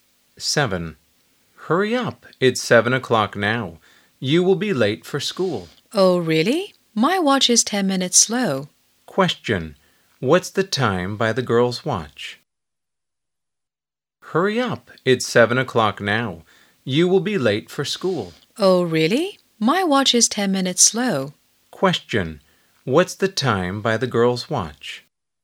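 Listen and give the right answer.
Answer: 6:50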